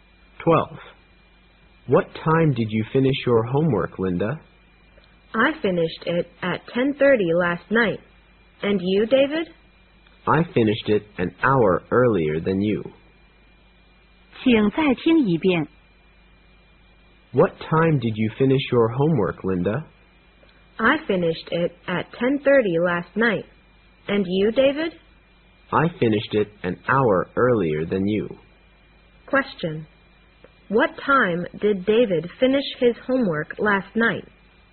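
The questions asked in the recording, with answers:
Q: What time did David finish his homework last night?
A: At 9:30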